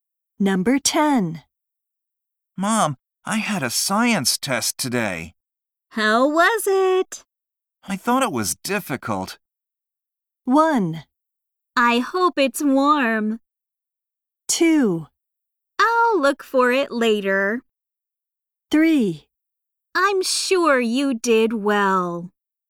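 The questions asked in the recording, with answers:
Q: I thought it was difficult.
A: 3: I'm sure you did well.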